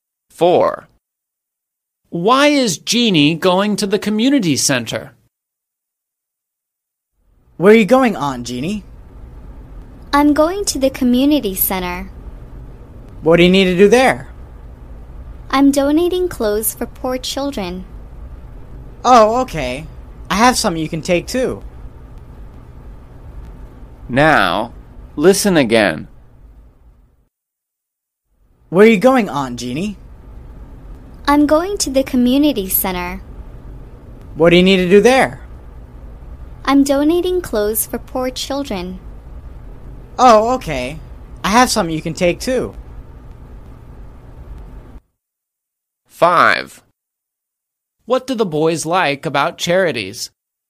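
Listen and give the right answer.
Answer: To donate clothes for poor children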